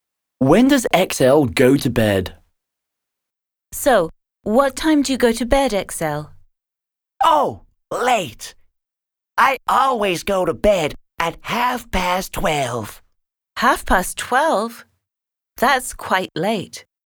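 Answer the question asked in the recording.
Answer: At 12:30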